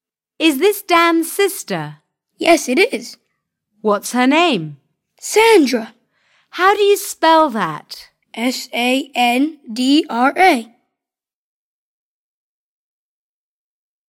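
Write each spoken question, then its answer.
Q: What's her name?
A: Sandra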